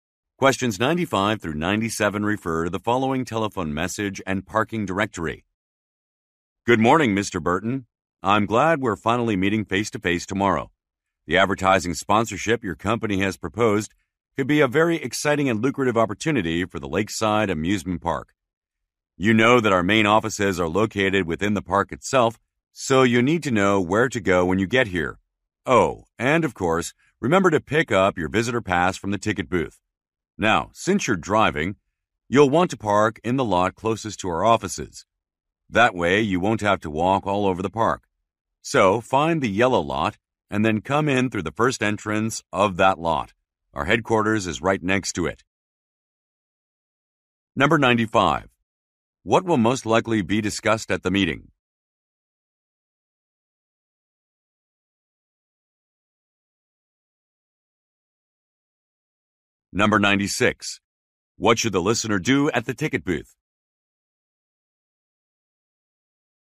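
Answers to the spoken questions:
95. An advertising sponsorship
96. Pick up a visitor pass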